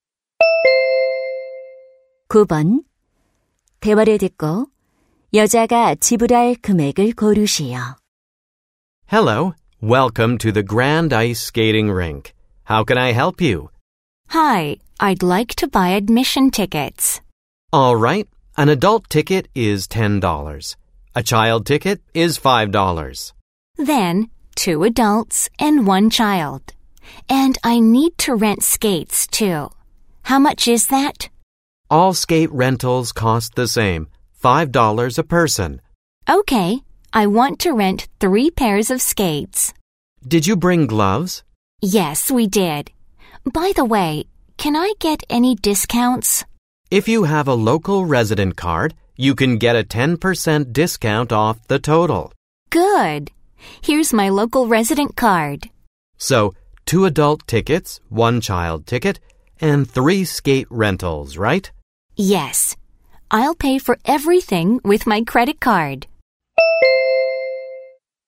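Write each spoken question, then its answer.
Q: 대화를 듣고 여자가 지불할 금액을 고르시오.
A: $36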